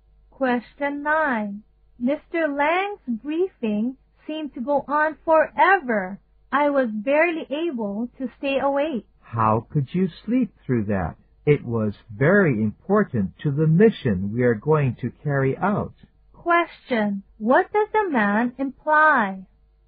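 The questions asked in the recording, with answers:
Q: What does the man imply?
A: The woman shouldn't have slept, because the briefing was important.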